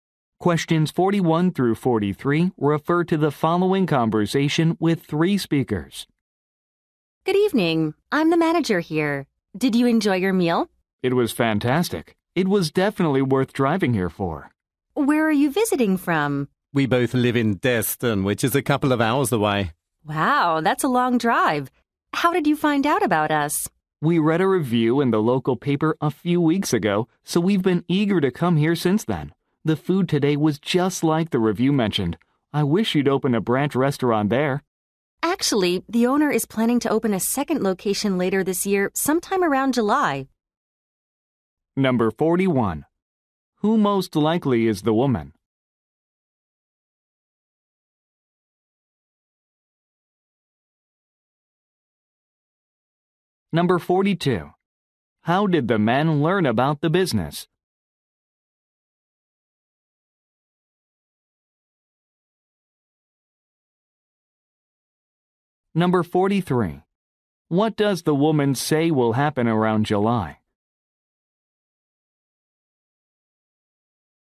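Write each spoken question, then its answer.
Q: Who most likely is the woman?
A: A restaurant manager

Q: How did the men learn about the business?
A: From a review in the local paper

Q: What does the woman say will happen around July?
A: A second location will open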